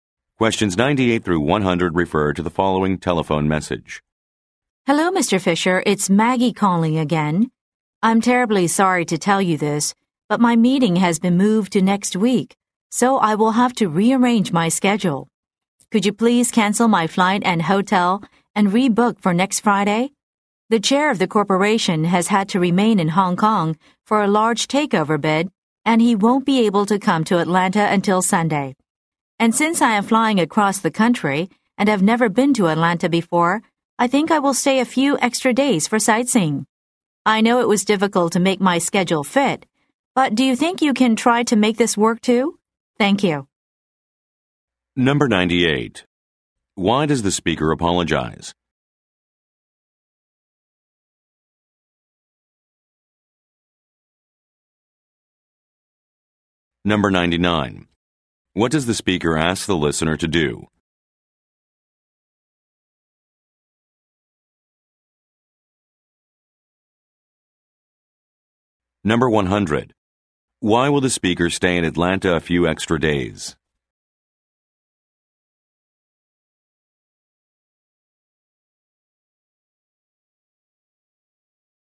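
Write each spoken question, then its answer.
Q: Why does the speaker apologize?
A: Her meeting was moved, so her plans must change

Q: What does the speaker ask the listener to do?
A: Cancel and rebook her flight and hotel for next Friday

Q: Why will the speaker stay in Atlanta a few extra days?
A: To go sightseeing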